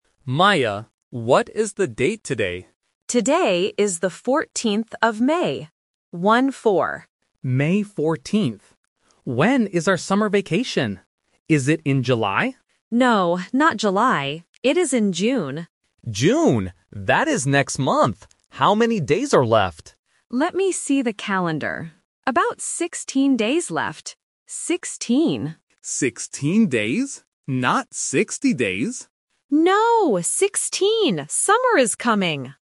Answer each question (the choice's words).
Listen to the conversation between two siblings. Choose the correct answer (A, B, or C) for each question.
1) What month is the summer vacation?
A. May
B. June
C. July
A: June

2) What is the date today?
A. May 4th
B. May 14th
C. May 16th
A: May 14th

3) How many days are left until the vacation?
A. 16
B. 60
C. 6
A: 16

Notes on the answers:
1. Leo asks, "Is it in July?" (Option C is the trap). Maya says, "No, not July. It is in June". Option A (May) is a trap because May is the current month, not the vacation month.
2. Maya clearly says, "Today is the 14th of May," and repeats the numbers "One-four." Option A (May 4th) is a phonetic trap for the number 14. Option C (May 16th) is a trap because 16 is the number of days left, not today's date.
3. Maya says there are "About 16 days left. Sixteen." Leo asks, "Not 60 days?" (Option B is the phonetic trap). Maya confirms, "No, 16." Option C (6) is just a plausible number to test the listener.